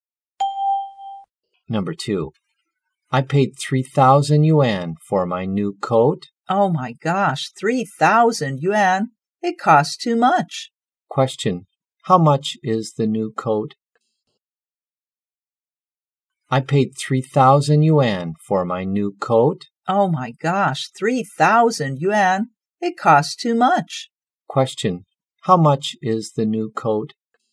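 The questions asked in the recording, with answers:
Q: Question, how much is the new coat?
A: 3,000 yuan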